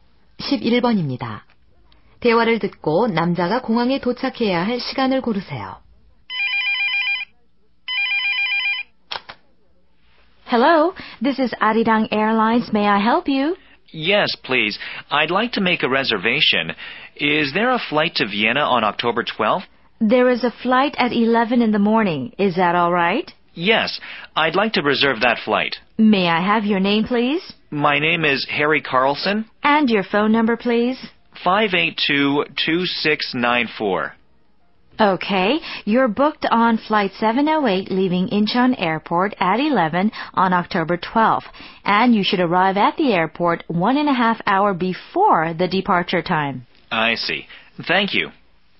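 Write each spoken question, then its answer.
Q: 대화를 듣고 남자가 공항에 도착해야 할 시간을 고르세요.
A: 오전 9시 30분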